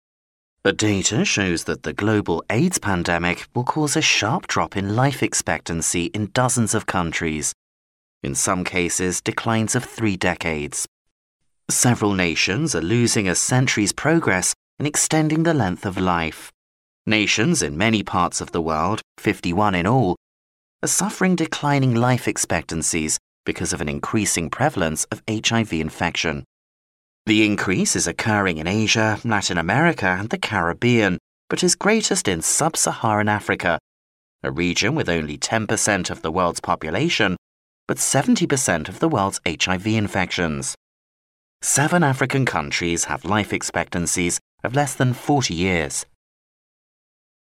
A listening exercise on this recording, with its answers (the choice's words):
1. Which of the following regions in the world will witness the sharpest drop in life expectancy?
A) Asia.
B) Latin America.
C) Sub-Saharan Africa.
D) The Caribbean.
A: Sub-Saharan Africa.

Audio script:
A data shows that the global AIDS pandemic will cause a sharp drop in life expectancy in dozens of countries, in some cases, declines of three decades. Several nations are losing a century's progress in extending the length of life. Nations in many parts of the world, 51 in all, are suffering declining life expectancies because of an increasing prevalence of HIV infection. The increase is occurring in Asia, Latin America, and the Caribbean, but is greatest in sub-Saharan Africa, a region with only 10% of the world's population but 70% of the world's HIV infections. Seven African countries have life expectancies of less than 40 years.